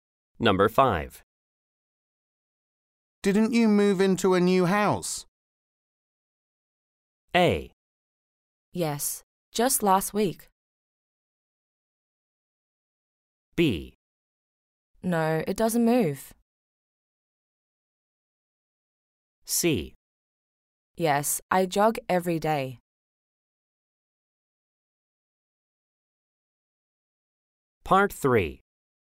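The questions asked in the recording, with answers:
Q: Didn't you move into a new house?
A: A: Yes, just last week.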